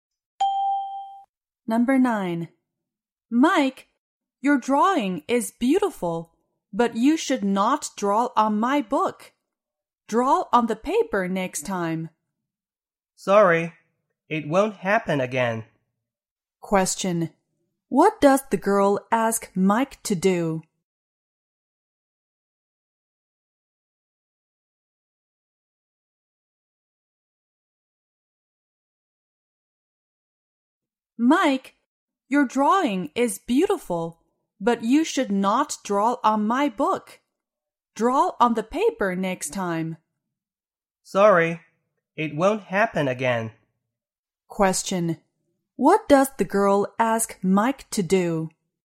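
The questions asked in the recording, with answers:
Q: What does the girl ask Mike to do?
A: Draw on the paper next time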